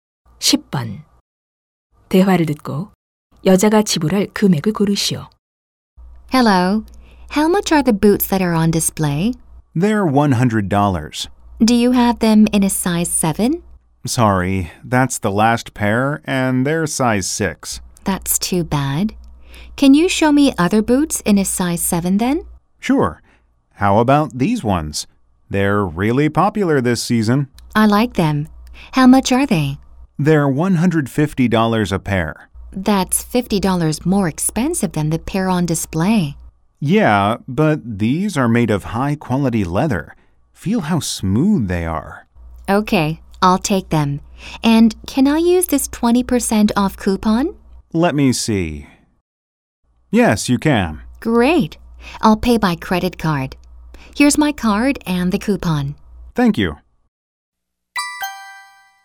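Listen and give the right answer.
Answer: 120달러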